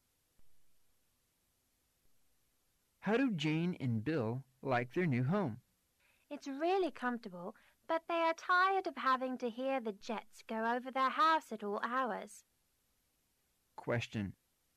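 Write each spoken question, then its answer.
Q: What is located close to Jane and Bill's new home?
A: An airport

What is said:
[听力原文] M: How do Jane and Bill like their new home? W: It's realty comfortable, but they are tired of having to hear the jets go over their house at all hours. Q: What is located close to Jane and Bill's new home?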